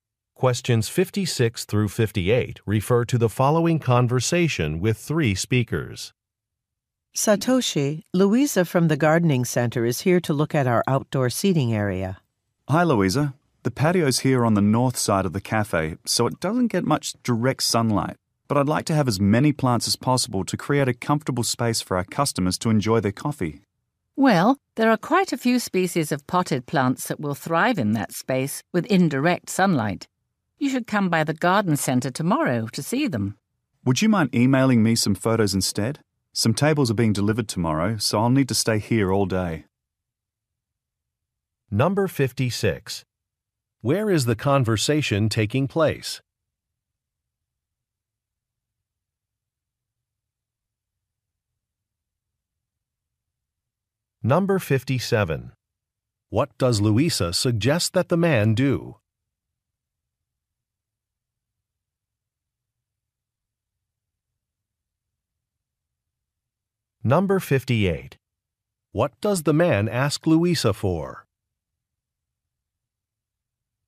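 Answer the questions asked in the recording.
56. At a cafe
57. Come to the garden center tomorrow
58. To email him photos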